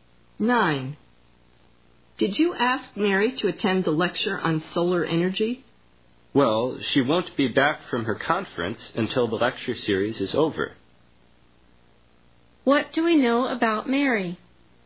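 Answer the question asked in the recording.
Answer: She can't attend the lecture because she'll be away at her conference.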